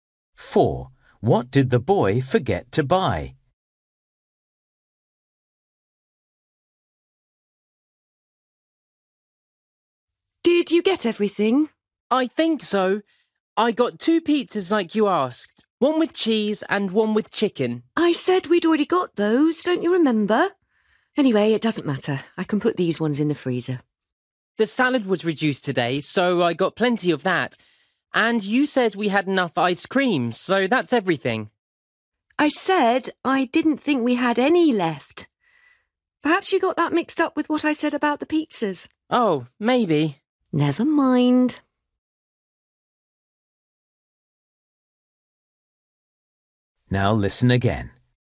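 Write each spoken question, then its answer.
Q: What did the boy forget to buy?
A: Ice cream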